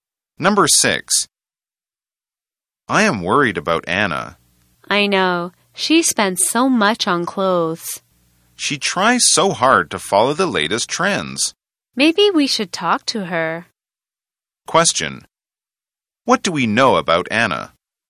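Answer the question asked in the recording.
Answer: She spends a lot on clothes to follow the latest trends.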